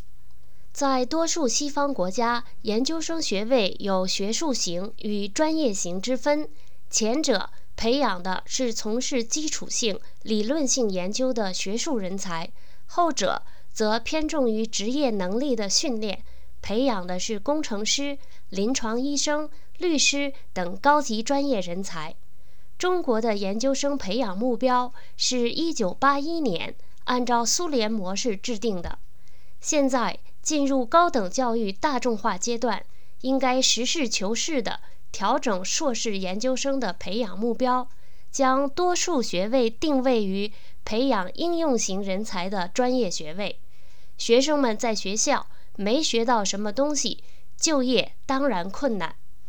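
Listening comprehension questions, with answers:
Please answer the following questions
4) 中国的研究生培养目标是如何制定的?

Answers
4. 1981年按照苏联模式制定的

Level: 3rd Year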